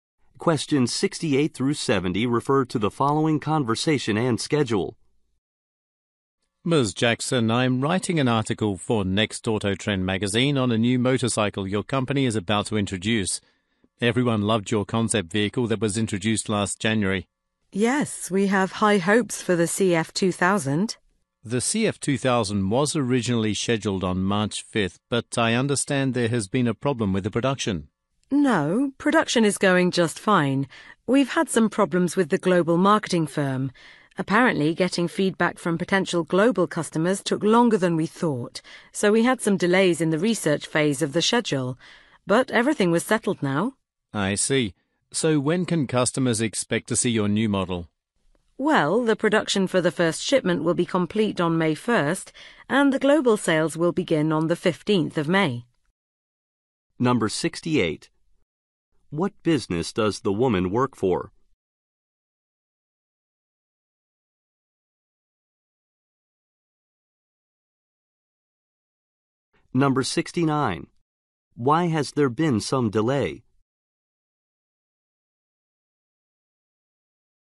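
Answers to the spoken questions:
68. A motorcycle manufacturer
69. Getting feedback from global customers took longer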